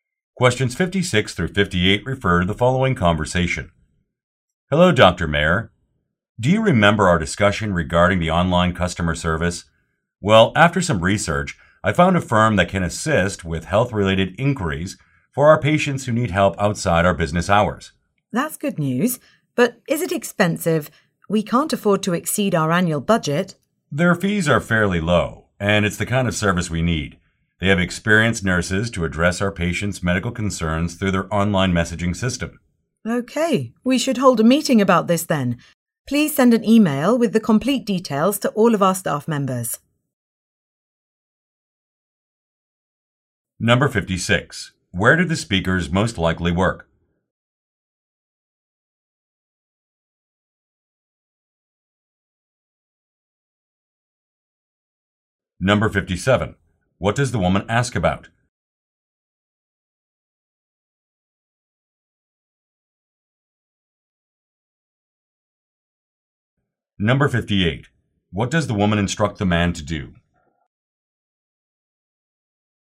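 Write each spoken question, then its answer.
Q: Where do the speakers most likely work?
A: At a medical clinic

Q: What does the woman ask about?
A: The cost of the service

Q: What does the woman instruct the man to do?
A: Email the complete details to all staff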